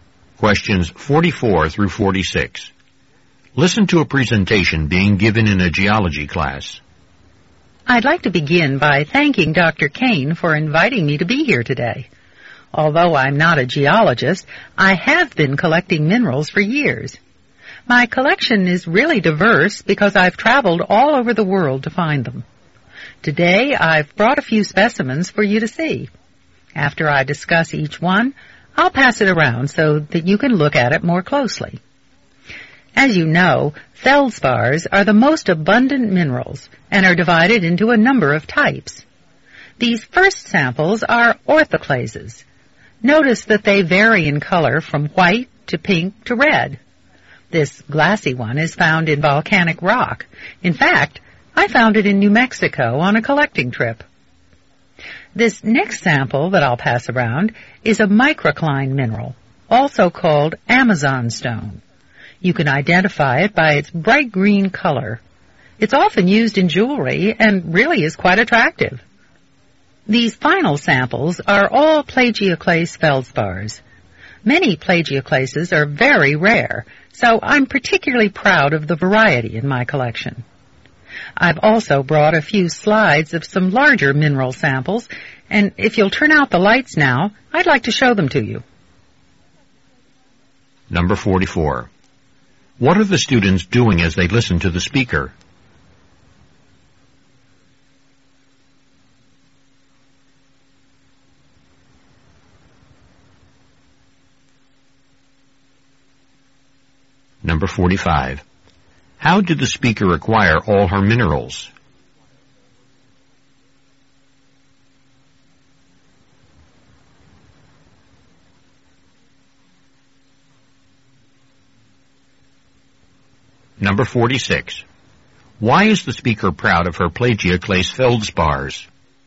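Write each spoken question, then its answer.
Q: How did the speaker acquire all her minerals?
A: By traveling all over the world

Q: Why is the speaker proud of her plagioclase feldspars?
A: Many plagioclases are very rare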